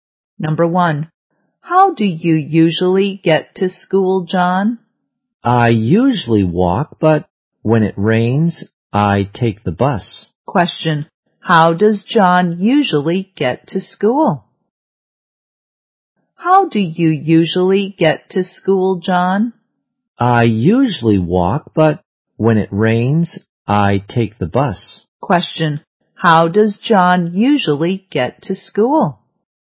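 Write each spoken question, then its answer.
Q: How does John usually get to school?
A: He usually walks.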